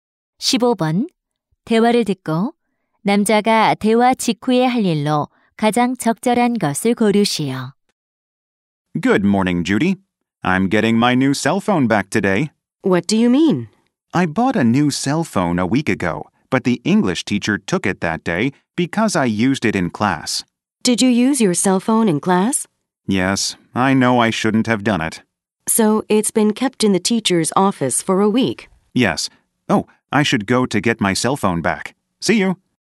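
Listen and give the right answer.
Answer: 교무실에 휴대전화 찾으러 가기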